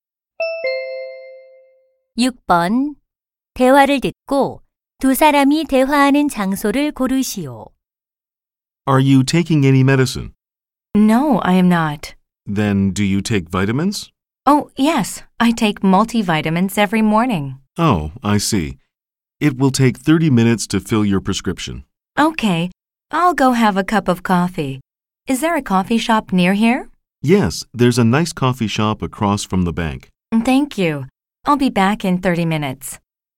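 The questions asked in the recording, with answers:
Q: 대화를 듣고 두 사람이 대화하는 장소를 고르시오.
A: 약국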